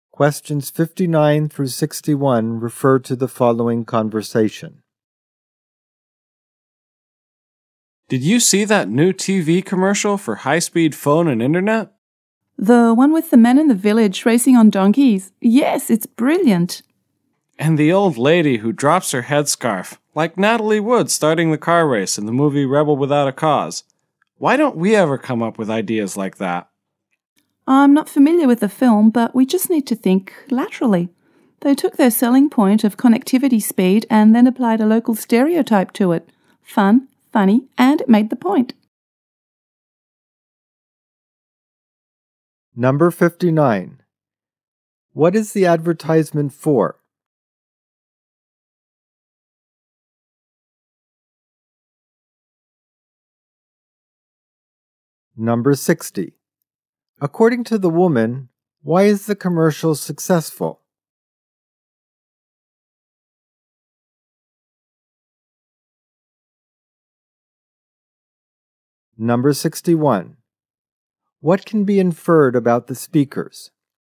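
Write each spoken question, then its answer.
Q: What is the advertisement for?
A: High-speed phone and internet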